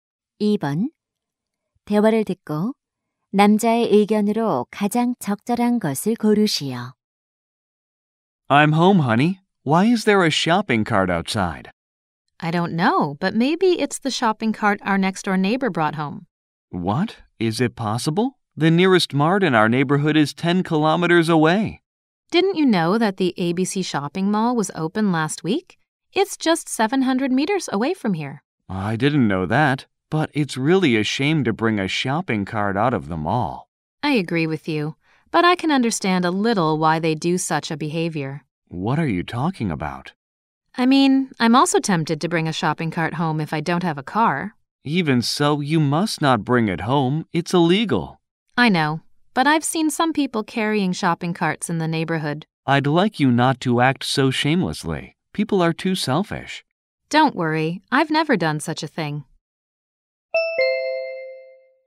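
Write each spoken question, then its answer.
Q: 대화를 듣고 남자의 의견으로 가장 적절한 것을 고르시오.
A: 쇼핑 카트를 집으로 가져가면 안 된다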